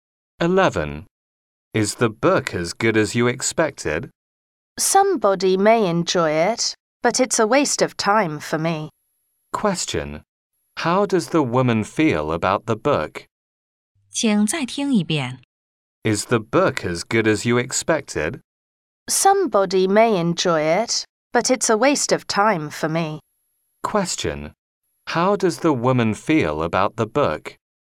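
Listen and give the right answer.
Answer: It's not good; a waste of time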